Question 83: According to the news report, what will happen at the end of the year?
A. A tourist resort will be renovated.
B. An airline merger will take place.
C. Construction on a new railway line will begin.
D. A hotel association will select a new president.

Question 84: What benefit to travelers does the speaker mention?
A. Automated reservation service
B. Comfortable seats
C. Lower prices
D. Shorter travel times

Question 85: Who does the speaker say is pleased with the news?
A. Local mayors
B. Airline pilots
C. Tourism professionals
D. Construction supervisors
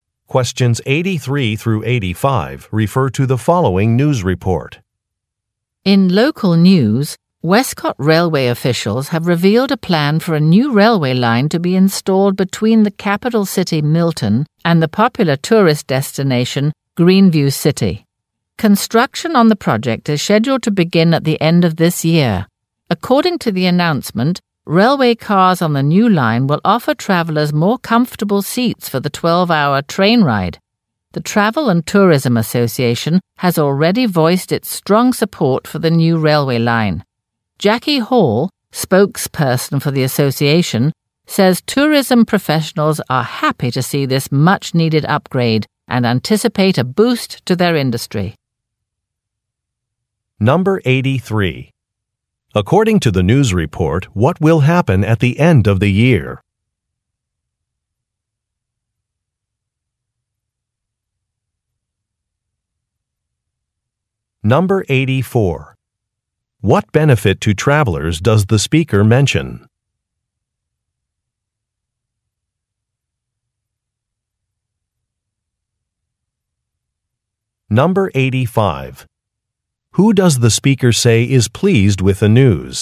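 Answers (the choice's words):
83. Construction on a new railway line will begin.
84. Comfortable seats
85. Tourism professionals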